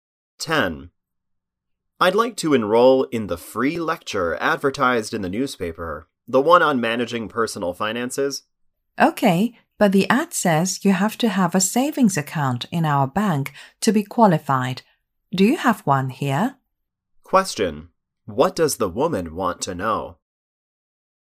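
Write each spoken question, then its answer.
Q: What does the woman want to know?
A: Whether the man has a savings account at their bank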